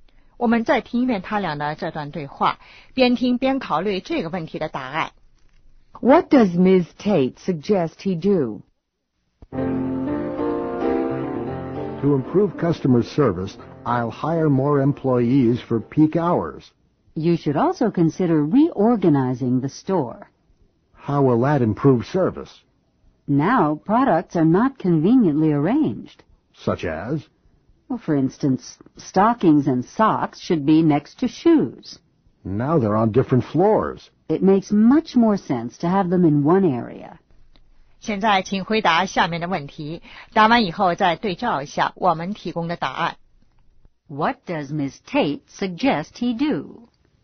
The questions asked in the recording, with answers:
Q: What does Ms. Tate suggest he do?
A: Reorganize the store.